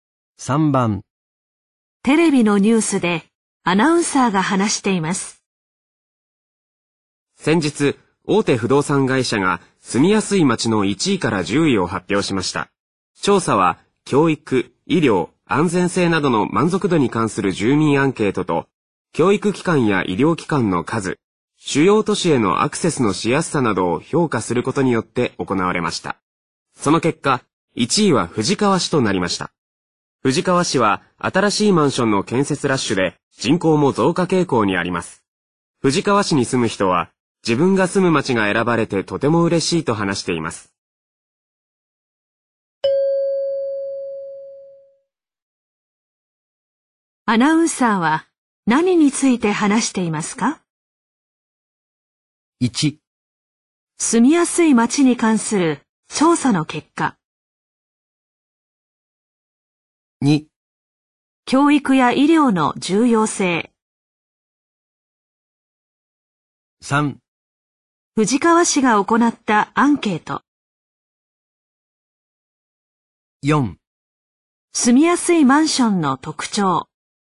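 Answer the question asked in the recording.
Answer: 1: 住みやすい町に関する調査の結果。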